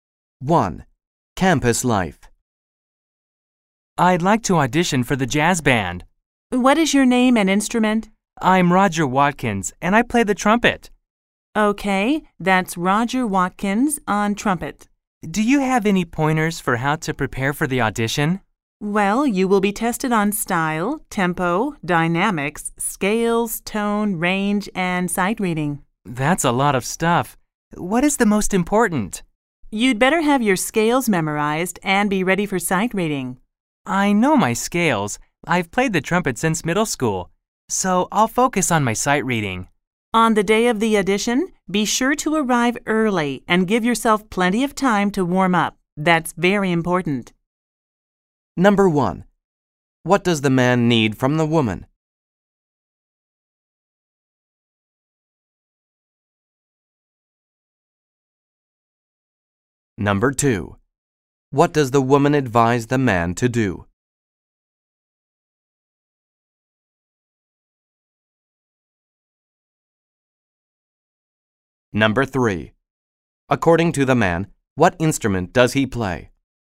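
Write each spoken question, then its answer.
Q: According to the man, what instrument does he play?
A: The trumpet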